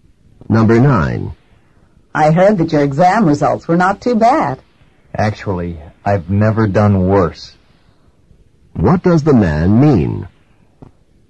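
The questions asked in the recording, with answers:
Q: What does the man mean?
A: These were his worst exam results ever.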